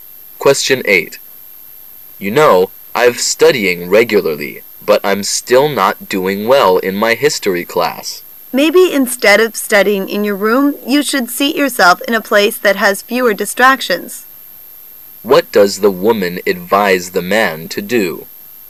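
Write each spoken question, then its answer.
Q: What does the woman advise the man to do?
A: Study in a place with fewer distractions.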